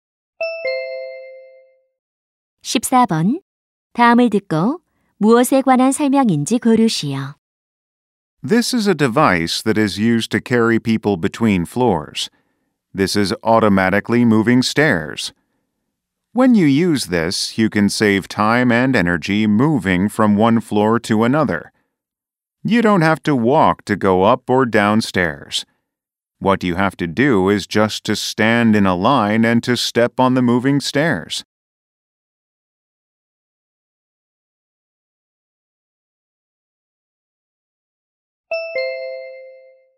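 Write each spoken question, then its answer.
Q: 다음을 듣고 무엇에 관한 설명인지 고르시오.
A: 에스컬레이터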